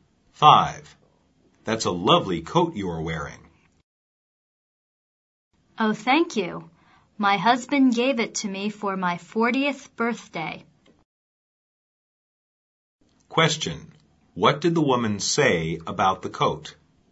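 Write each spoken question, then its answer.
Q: What did the woman say about the coat?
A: Her husband gave it to her for her 40th birthday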